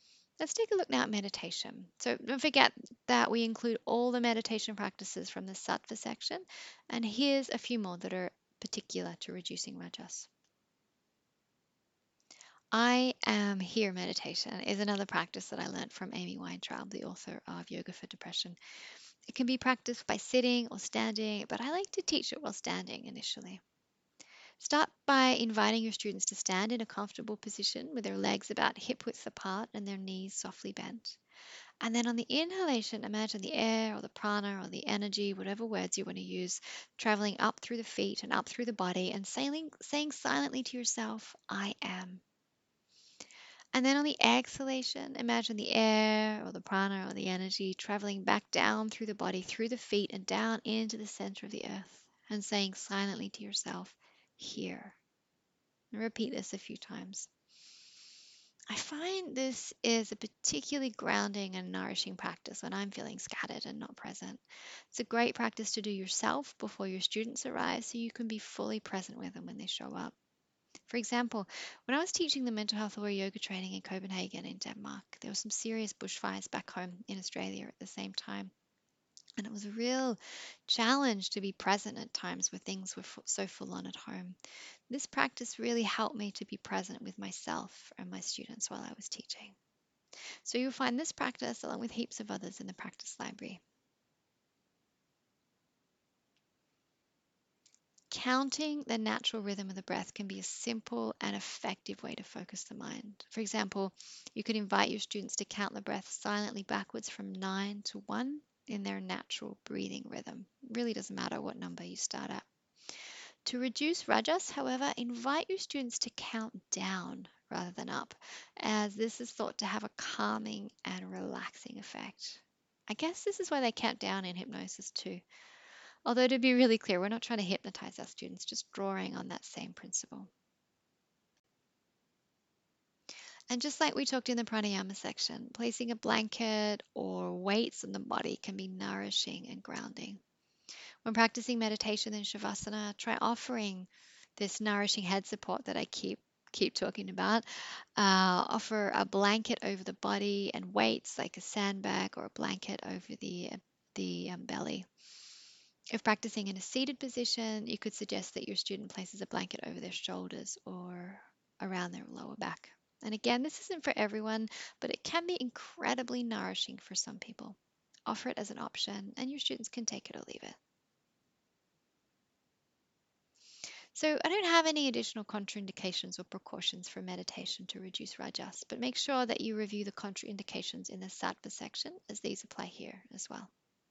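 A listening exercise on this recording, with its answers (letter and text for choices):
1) When teaching meditation, what can be helpful in reducing rajas?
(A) I am here meditation.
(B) A counting meditation, where you count down rather than counting up.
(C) Offering a blanket to place over the body (over the shoulders if sitting or over the entire body if lying).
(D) All of the above.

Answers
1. (D) All of the above.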